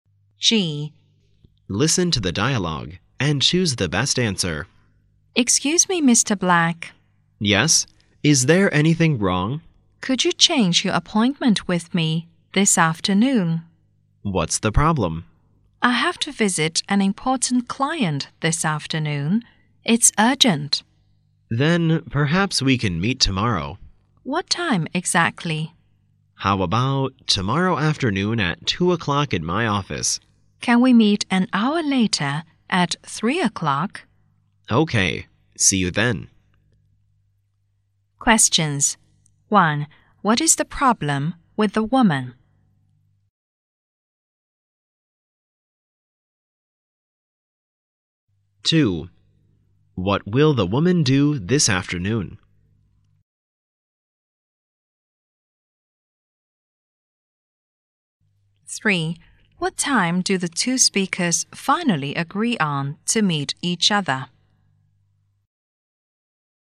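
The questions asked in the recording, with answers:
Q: What is the problem with the woman?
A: She has to visit an important client this afternoon

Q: What will the woman do this afternoon?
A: Visit an important client

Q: What time do the two speakers finally agree on to meet each other?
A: 3 o'clock tomorrow afternoon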